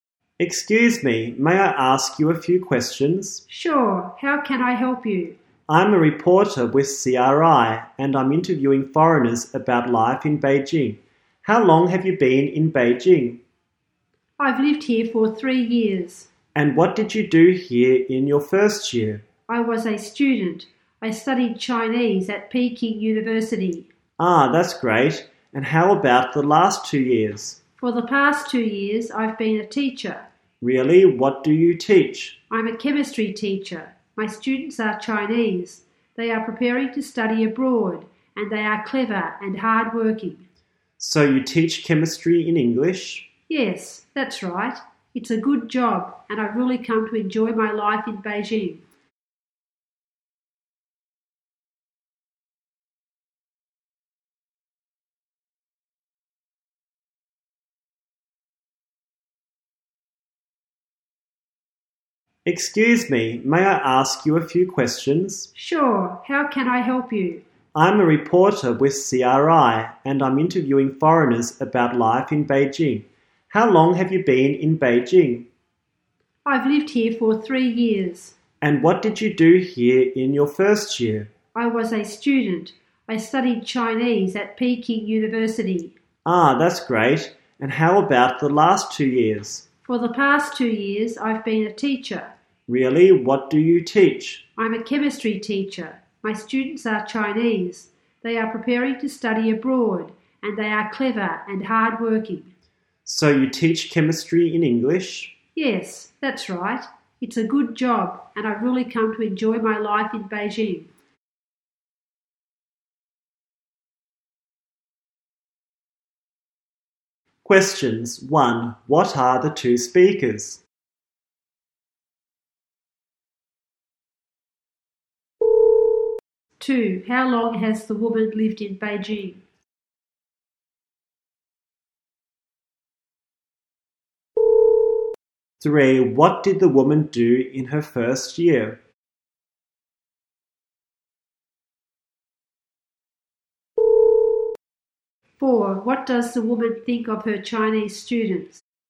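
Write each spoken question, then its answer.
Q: What are the two speakers?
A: A reporter and a teacher

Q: How long has the woman lived in Beijing?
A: 3 years

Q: What did the woman do in her first year?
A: She studied Chinese at Peking University.

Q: What does the woman think of her Chinese students?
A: Clever and hardworking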